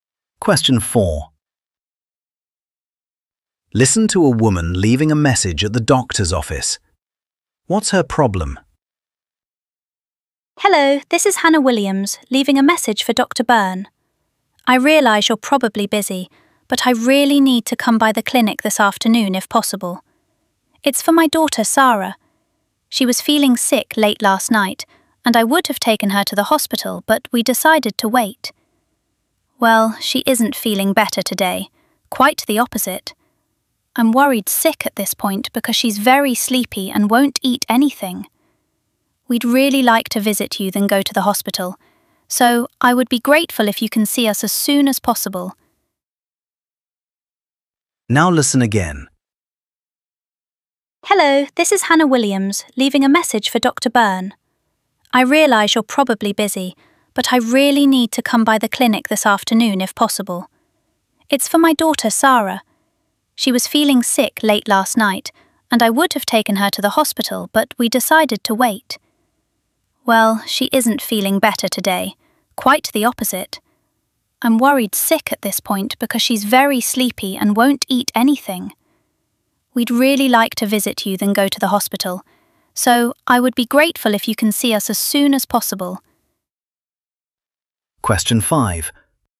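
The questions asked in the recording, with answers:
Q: What's her problem?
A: Her daughter is ill, getting worse, very sleepy and won't eat, so she urgently needs to see the doctor.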